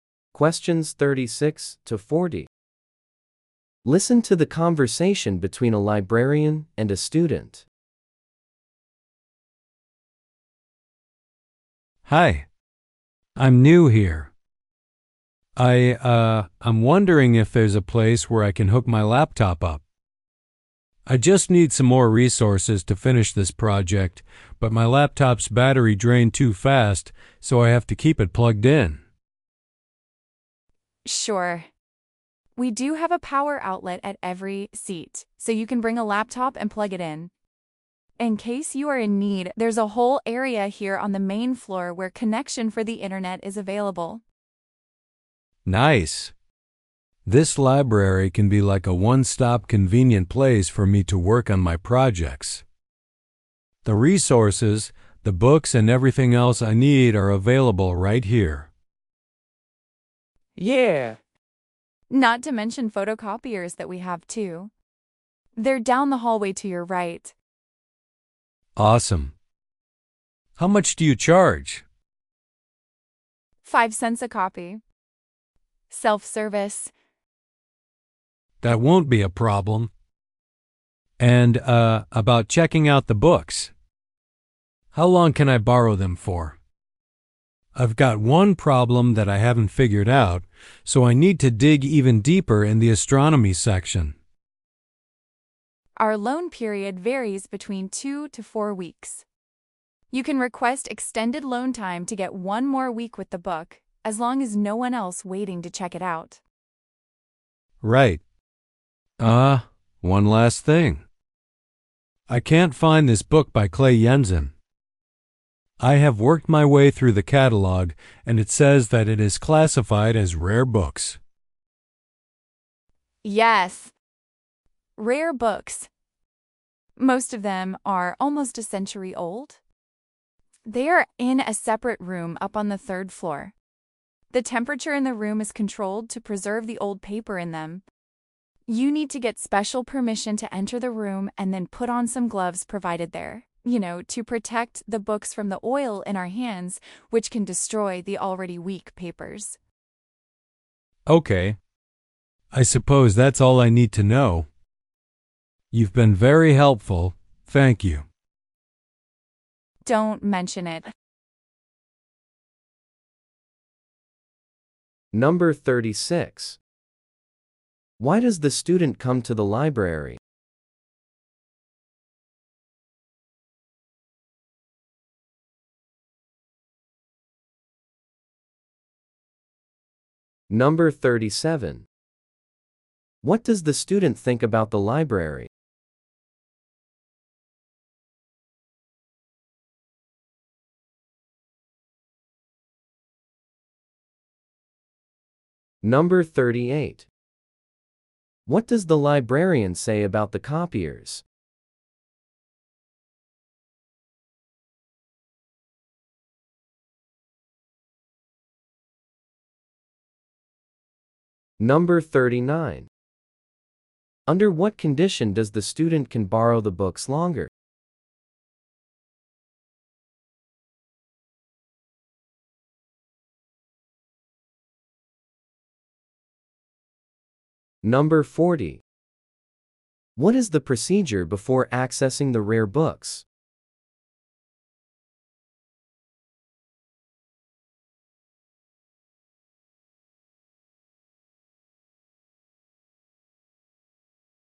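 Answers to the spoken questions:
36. To find resources for his project and to plug in his laptop.
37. It is a convenient one-stop place for working on his projects.
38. They are self-service, cost 5 cents a copy, and are down the hallway to the right.
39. If no one else is waiting to check the book out.
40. Get special permission to enter the room and put on gloves.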